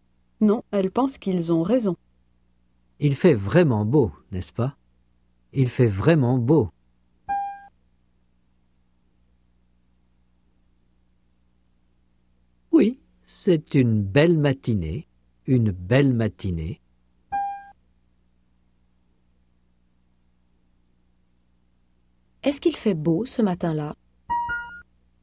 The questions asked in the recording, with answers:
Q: Est-ce qu'il fait beau ce matin-là?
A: Oui, il fait vraiment beau.